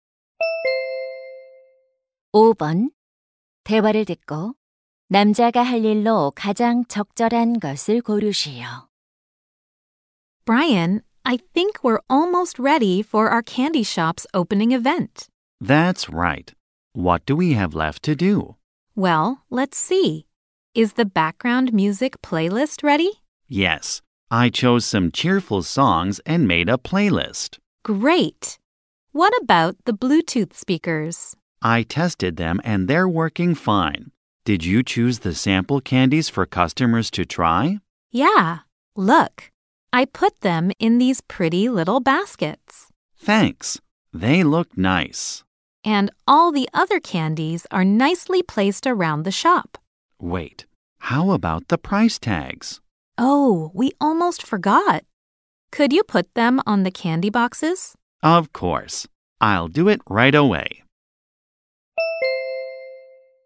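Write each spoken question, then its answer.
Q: 대화를 듣고 남자가 할 일로 가장 적절한 것을 고르시오.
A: 사탕 상자에 가격표 붙이기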